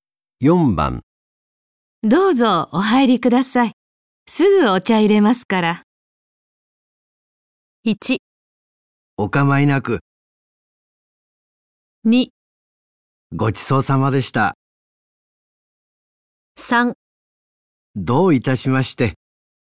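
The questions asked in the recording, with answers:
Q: どうぞお入りください。すぐお茶入れますから。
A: 1: お構いなく。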